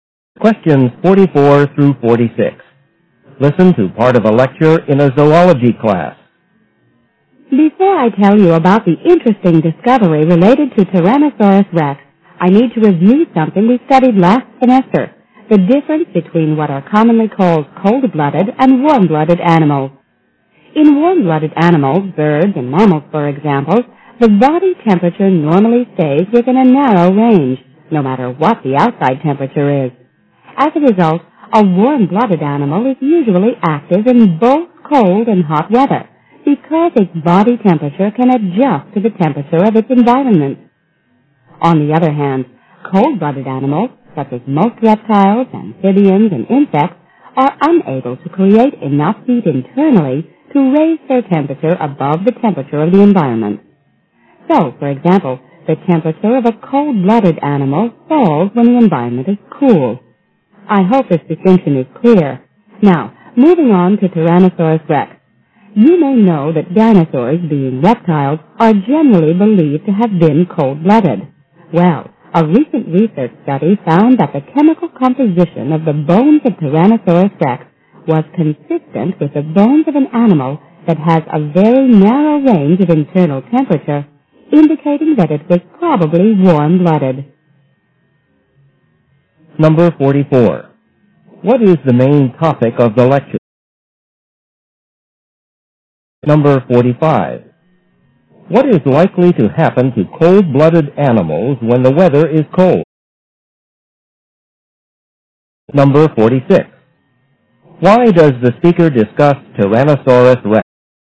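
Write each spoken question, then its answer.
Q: What is likely to happen to cold-blooded animals when the weather is cold?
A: Their body temperature falls

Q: Why does the speaker discuss Tyrannosaurus rex?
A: Research suggests it was probably warm-blooded, unlike most reptiles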